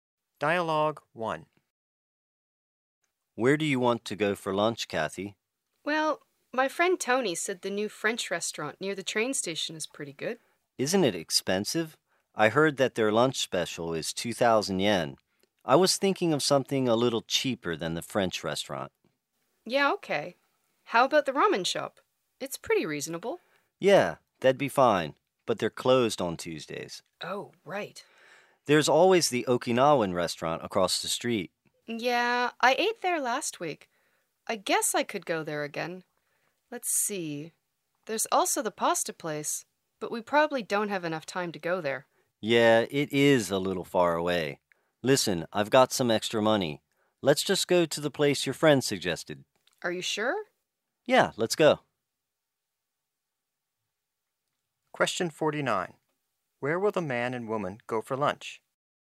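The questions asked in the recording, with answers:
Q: Where will the man and woman go for lunch?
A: The new French restaurant near the train station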